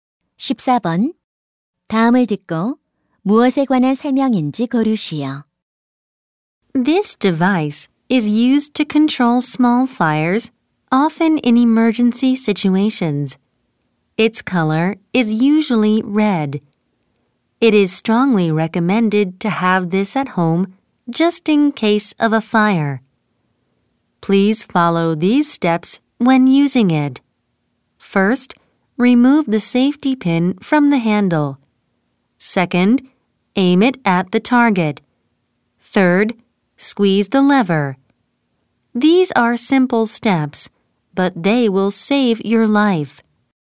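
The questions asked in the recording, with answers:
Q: 다음을 듣고 무엇에 관한 설명인지 고르시오.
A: 소화기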